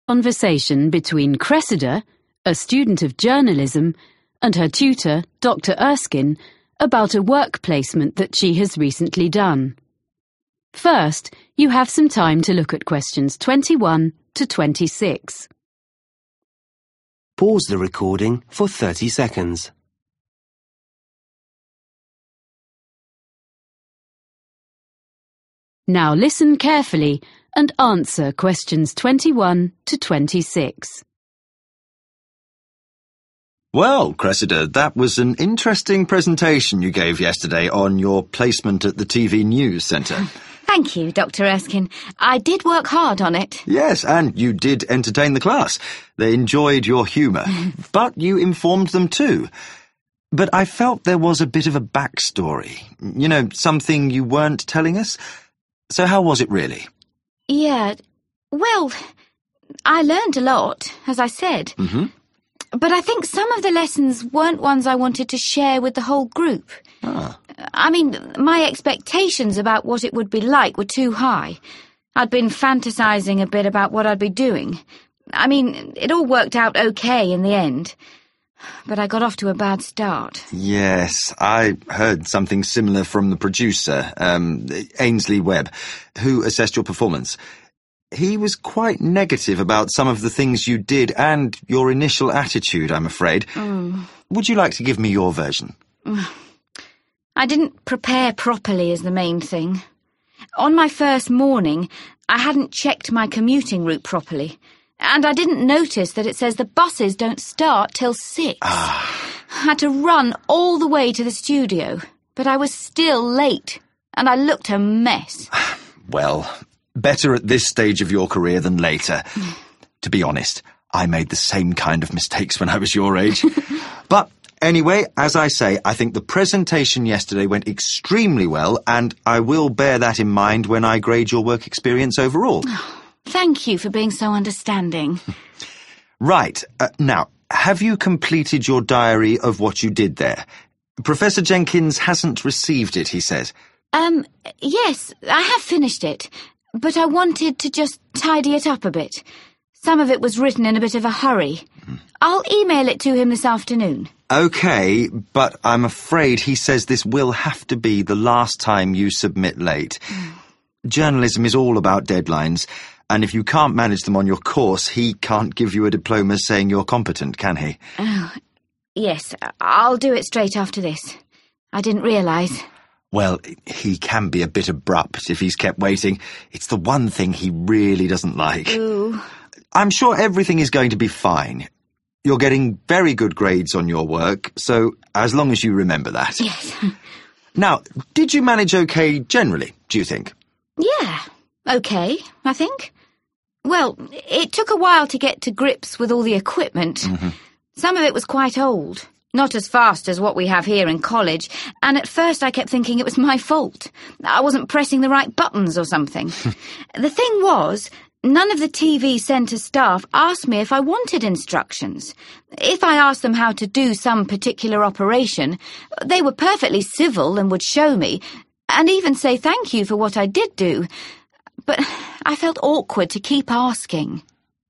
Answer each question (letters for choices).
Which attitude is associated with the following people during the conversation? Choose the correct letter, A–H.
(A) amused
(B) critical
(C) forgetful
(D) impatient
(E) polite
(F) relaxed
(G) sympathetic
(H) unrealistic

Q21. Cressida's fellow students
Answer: A

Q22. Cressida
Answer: H

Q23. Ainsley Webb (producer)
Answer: B

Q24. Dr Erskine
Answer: G

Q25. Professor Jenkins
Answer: D

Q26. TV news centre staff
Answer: E